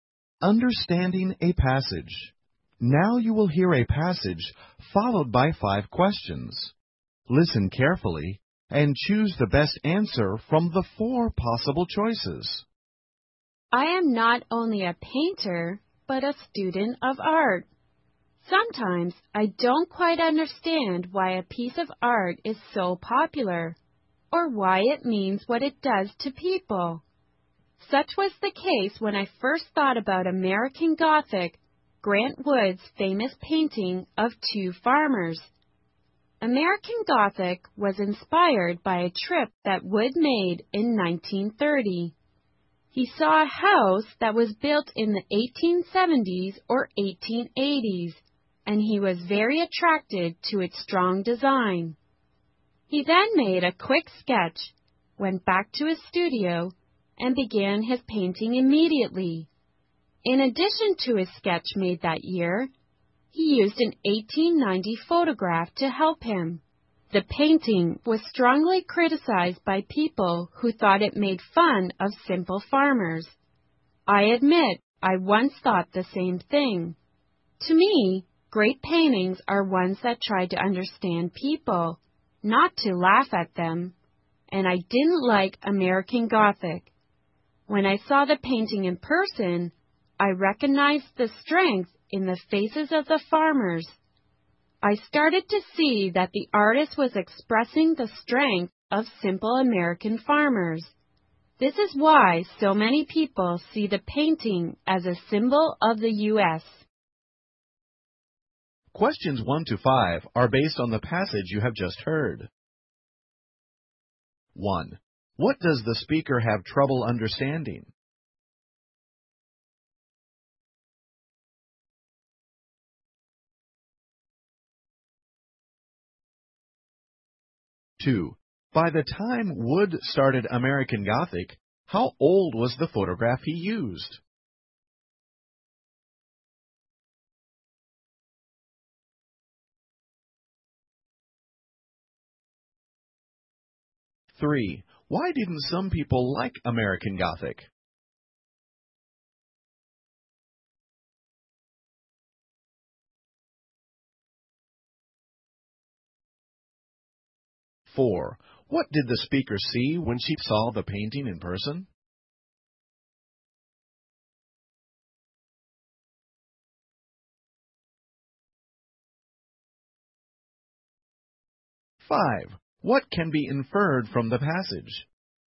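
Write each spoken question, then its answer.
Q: What does the speaker have trouble understanding?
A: Why some art is popular or what it means to people

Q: By the time Wood started American Gothic, how old was the photograph he used?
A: 40 years old

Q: Why didn't some people like American Gothic?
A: They thought it made fun of simple farmers

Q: What did the speaker see when she saw the painting in person?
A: The strength in the farmers' faces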